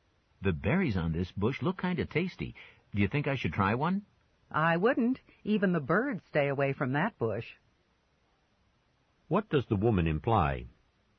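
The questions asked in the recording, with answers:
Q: What does the woman imply?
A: The berries may be poisonous, so he shouldn't eat one.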